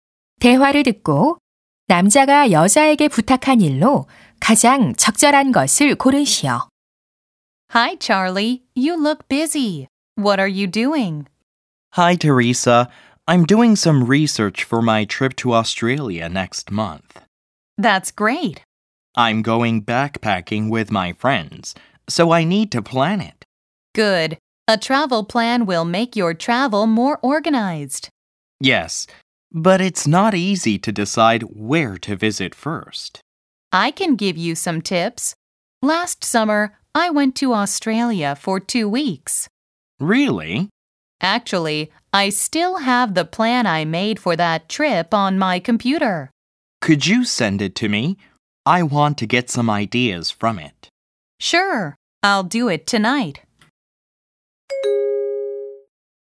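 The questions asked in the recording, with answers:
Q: 대화를 듣고 남자가 여자에게 부탁한 일로 가장 적절한 것을 고르시오.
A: 여행 계획서 보내 주기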